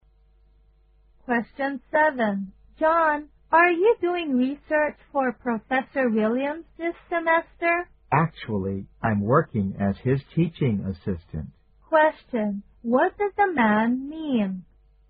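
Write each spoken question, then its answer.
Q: What does the man mean?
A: He is not doing research for Professor Williams; he is his teaching assistant.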